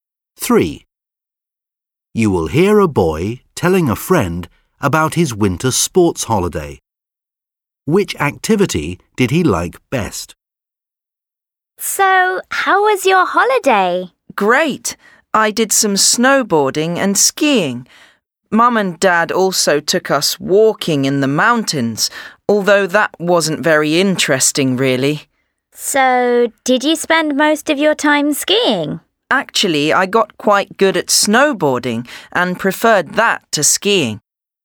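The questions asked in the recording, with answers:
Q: Which activity did he like best?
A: Snowboarding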